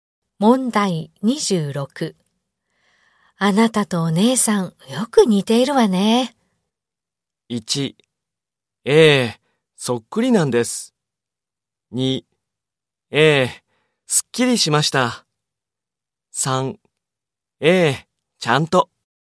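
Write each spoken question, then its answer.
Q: あなたとお姉さん、よく似ているわね。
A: 1: ええ、そっくりなんです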